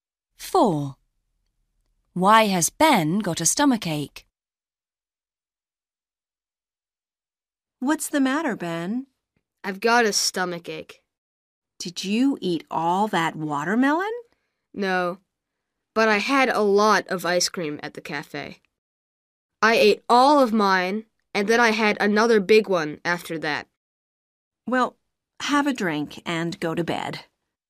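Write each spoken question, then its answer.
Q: Why has Ben got a stomachache?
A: He ate a lot of ice cream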